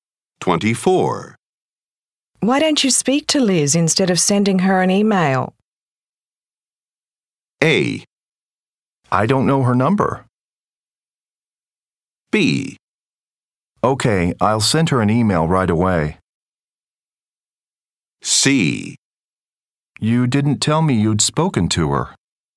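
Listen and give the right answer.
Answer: A: I don't know her number.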